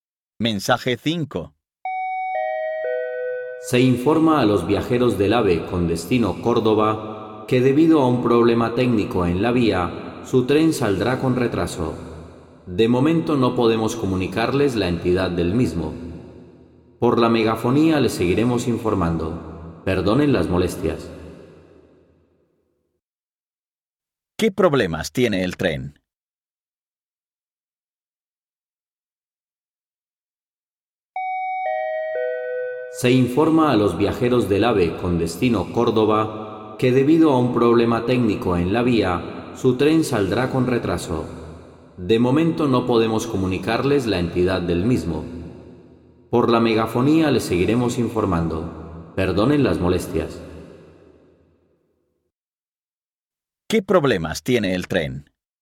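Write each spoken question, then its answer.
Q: ¿Qué problemas tiene el tren?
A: Saldrá con retraso por un problema técnico en la vía.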